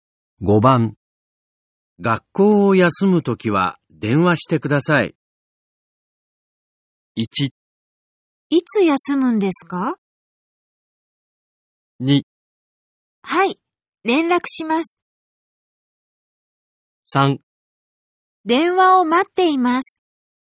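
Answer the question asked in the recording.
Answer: 2: はい、連絡します。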